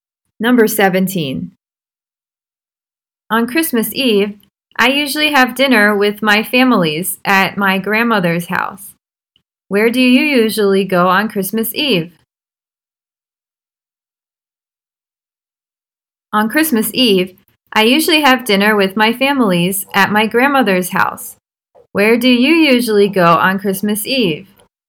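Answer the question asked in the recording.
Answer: My grandmother's house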